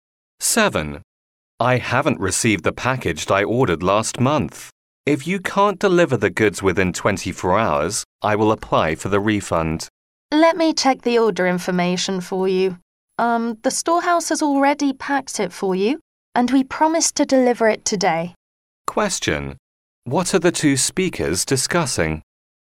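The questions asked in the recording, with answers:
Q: What are the two speakers discussing?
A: A package that hasn't been delivered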